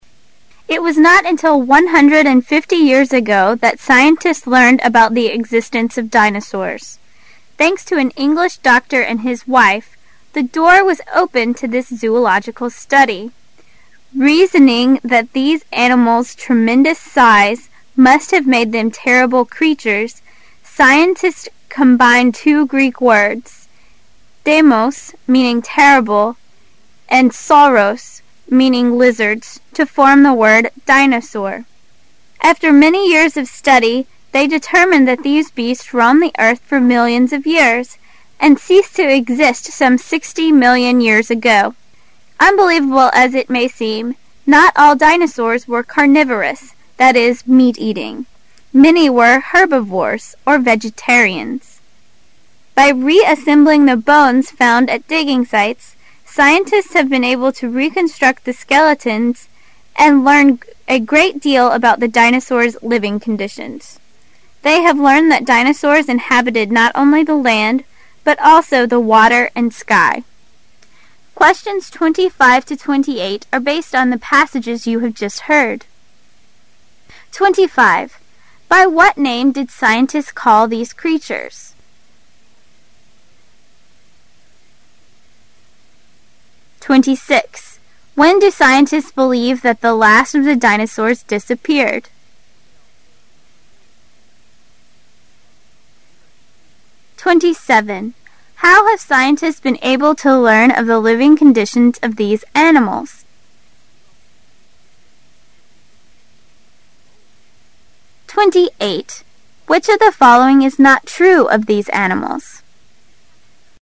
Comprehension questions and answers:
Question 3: How have scientists been able to learn of the living conditions of these animals?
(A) By digging site.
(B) By reconstructing skeletons.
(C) By observing them closely.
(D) By living with them.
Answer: By reconstructing skeletons.

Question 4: Which of the following is not true of these animals?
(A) Scientists have studied them for centuries.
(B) They were meat eating as well as plant eating.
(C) They wandered the earth for millions of years.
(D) They lived on land, in the sea, and in the sky.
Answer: Scientists have studied them for centuries.

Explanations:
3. [试题分析]本题考查考生对信息的掌握能力。 [关键词句]By reassembling the bones found at digging sites,scientists have been able to reconstruct the skeletons and learn great deal about the dinosaur's living conditions. [详细解答]文章中提到通过重组骨架,科学家能获知恐龙的生活条件。故选B。
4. [试题分析]本题考查考生对文章的综合理解能力。 [关键词句]It was not until one hundred and fifty years ago that scientists learned about the existence 0f dinosaurs. [详细解答]文章开头就提到人类仅仅在一百五十年前才发现恐龙的存在。故选A。

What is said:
[解析] 25-28 It was not until one hundred and fifty years ago that scientists learned about the existence of dinosaurs. Thanks to an English doctor and his wife, the door was opened to this zoological study. Reasoning that these animals' tremendous size must have made them terrible creatures, scientists combined two Greek words, deimos, meaning terrible, and sauros, meaning lizards, to form the word dinosaur. After many years of study, they determined that these beasts roamed the earth for millions of years, and ceased to exist some sixty million years ago. Unbelievable as it may seem, not all dinosaurs were carnivorous, that is, meat eating. Many were herbivorous, or vegetarians. By reassembling the bones found at digging sites, scientists have been able to reconstruct the skeletons and learn great deal about the dinosaur's living conditions. They have learned that dinosaurs inhabited not only the land, but also the water and sky. Questions 25 to 28 are based on the passage you have just heard. By what name did scientists call these creatures?

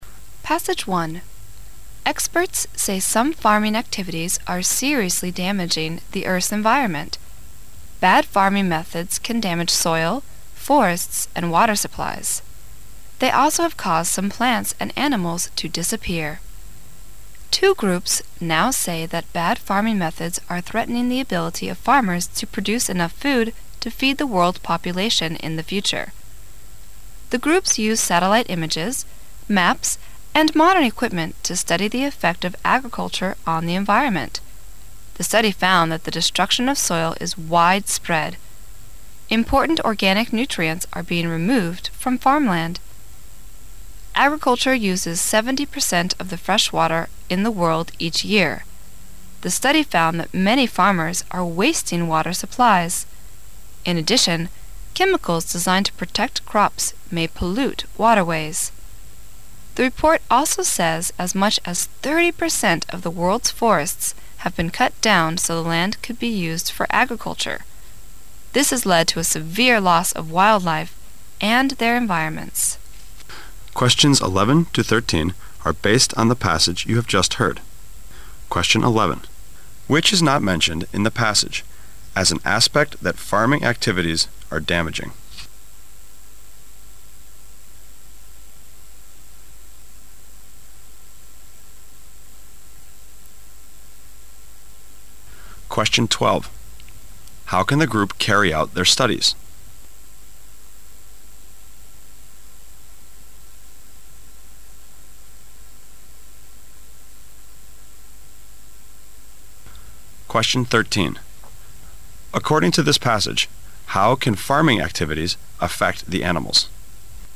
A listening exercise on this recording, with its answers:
Section B Directions:In this section, you will hear 3 short passages. At the end of each passage, you will hear some questions. Both the passage and the questions will be spoken only once. After you hear a question, you must choose the best answer from the four choices marked A), B), C) and D). Then mark the corresponding letter on the Answer Sheet with a single line through the centre.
According to this passage, how can fanning activities affect the animals?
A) By forcing them farming.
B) By affecting the quality of soils.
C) By adding chemicals and pollute the waterways.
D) By affecting the environments they live in.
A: By affecting the environments they live in.

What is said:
[解析] 11-13 Experts say some farming activities are seriously damaging Earth's environment. Bad farming methods can damage soil, forests and water supplies. They also have caused some plants and animals to disappear. Two groups now say that bad farming methods are threatening the ability of farmers to produce enough food to feed the world population in the future. The groups used satellite images, maps and modern equipment to study the effect of agriculture on the environment. The study found that the destruction of soil is widespread. Important organic nutrients are being removed from farmland. Agriculture uses seventy percent of the freshwater in the world each year. The study found that many farmers are wasting water supplies. In addition, chemicals designed to protect crops may pollute waterways. The report also says as much as thirty percent of the world's forests have been cut down so the land could be used for agriculture. This has led to a severe loss of wildlife and their environments. 11. Which is not mentioned in the passage as an aspect that fanning activities are damaging?

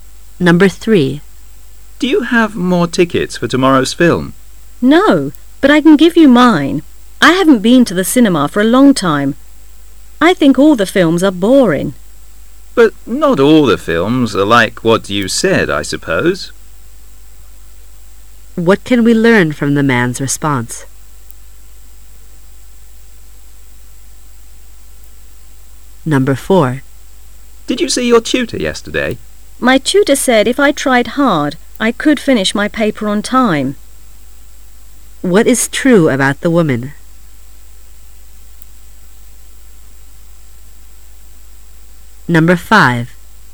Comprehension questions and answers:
What is true about the woman?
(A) The woman has finished her paper on time.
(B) The tutor has finished the paper on time.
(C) The woman is writing her paper now.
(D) The woman is trying hard to see her tutor.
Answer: The woman is writing her paper now.

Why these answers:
M:Did you see your tutor yesterday? W:My tutor said if I tried hard I could finish my paper on time. Q:What is true about the woman?

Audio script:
[解析] M:Do you have more tickets for tomorrow's film? W:No,but l can give you mine.I haven't been to the cinema for a long time.I think all the films are boring. M:But not all the films are like what you said,I suppose. Q:What can we learn from the man's response?

